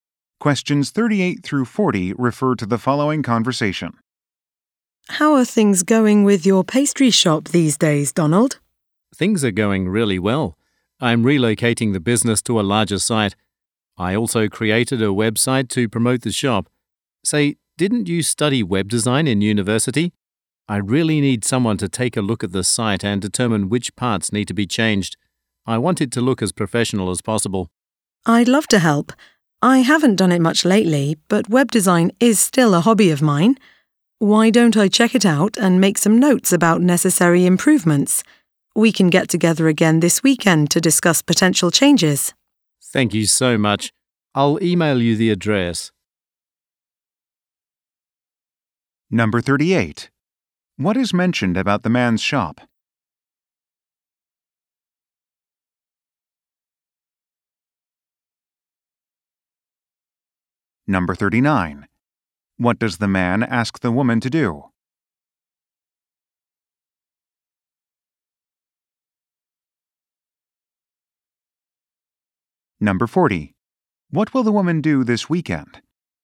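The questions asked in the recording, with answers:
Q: What is mentioned about the man's shop?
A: It is relocating to a larger site

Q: What does the man ask the woman to do?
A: Review his website and say what needs changing

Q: What will the woman do this weekend?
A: Meet with the man to discuss changes to the website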